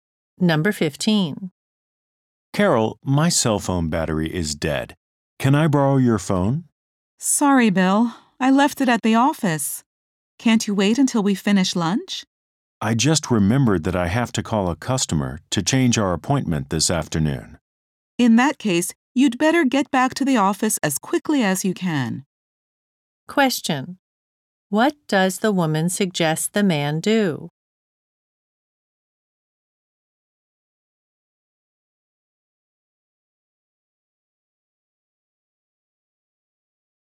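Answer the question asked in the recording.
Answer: Go back to the office as quickly as he can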